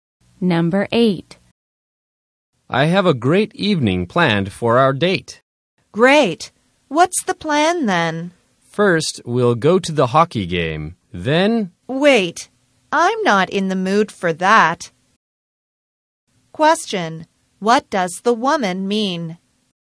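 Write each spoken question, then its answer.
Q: What does the woman mean?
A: She doesn't want to go to the hockey game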